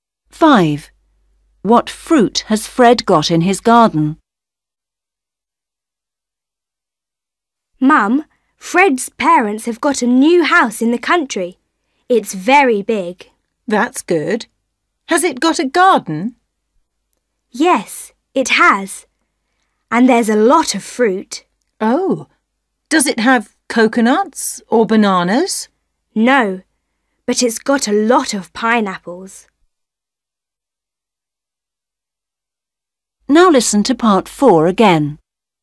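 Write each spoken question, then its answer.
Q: What fruit has Fred got in his garden?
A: pineapples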